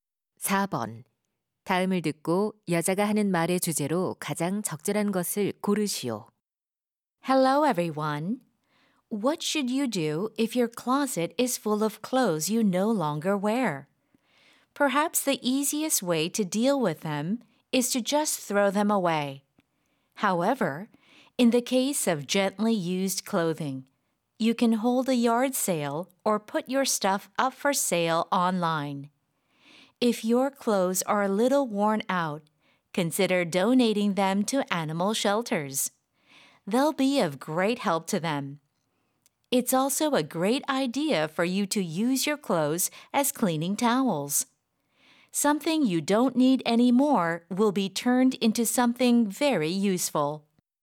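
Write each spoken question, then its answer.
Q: 다음을 듣고 여자가 하는 말의 주제로 가장 적절한 것을 고르시오.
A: 더 이상 입지 않는 옷을 처리하는 방법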